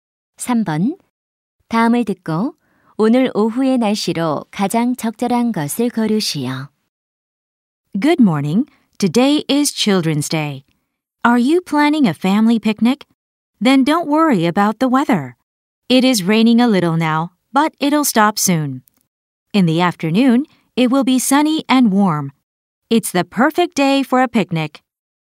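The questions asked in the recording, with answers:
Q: 다음을 듣고 오늘 오후의 날씨로 가장 적절한 것을 고르시오.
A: 맑고 따뜻함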